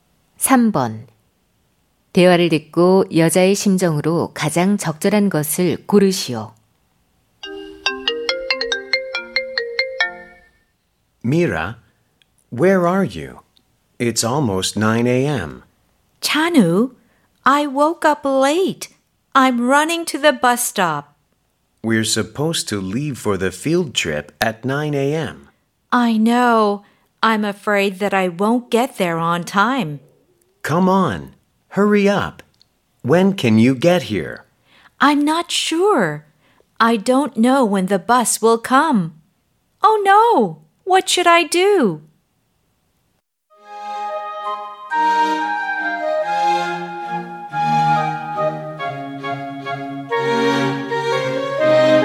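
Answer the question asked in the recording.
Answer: 불안함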